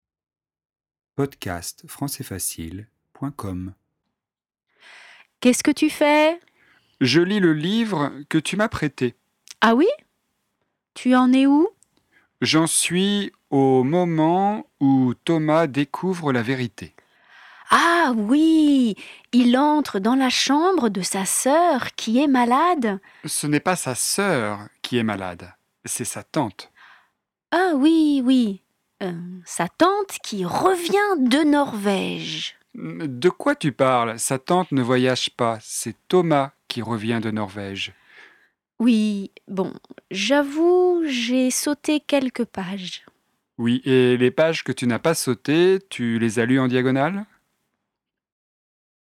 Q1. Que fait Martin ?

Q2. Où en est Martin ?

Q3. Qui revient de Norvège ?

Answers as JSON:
{"1": "Il lit le livre que Zoé lui a prêté.", "2": "Il en est au moment où Thomas découvre la vérité.", "3": "C'est Thomas."}

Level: intermediate